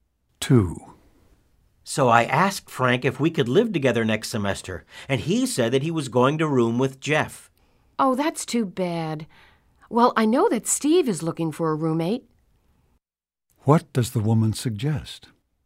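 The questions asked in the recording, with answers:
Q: What does the woman suggest?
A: Room with Steve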